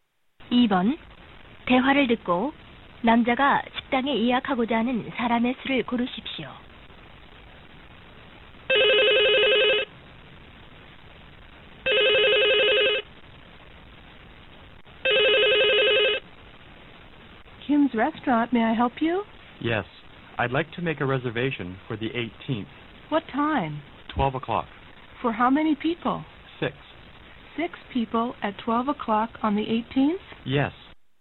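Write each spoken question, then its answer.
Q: 2번 대화를 듣고 남자가 식당에 예약하고자 하는 사람의 수를 고르십시오.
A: 6명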